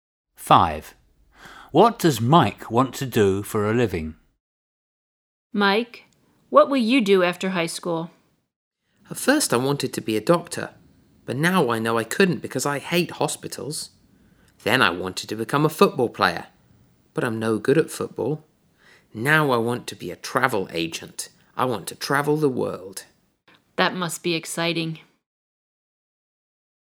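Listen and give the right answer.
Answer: be a travel agent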